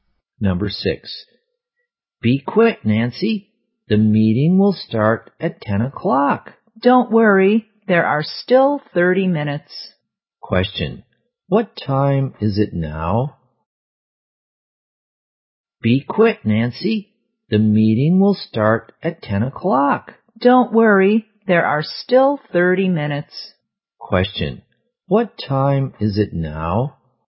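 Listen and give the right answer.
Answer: 9:30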